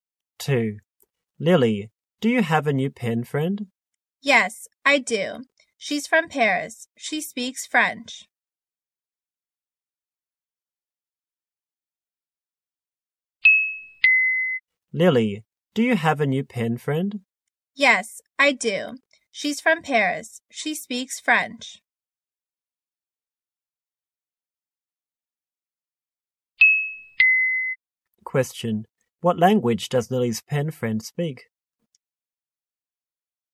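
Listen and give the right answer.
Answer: French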